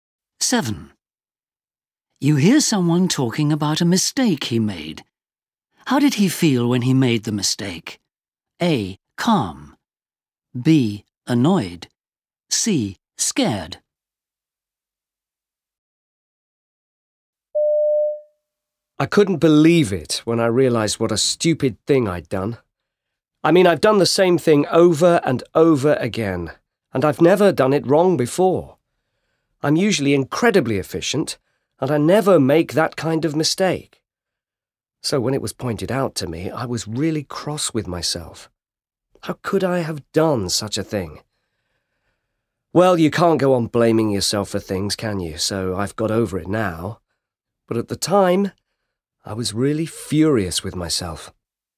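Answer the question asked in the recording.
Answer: B: Annoyed.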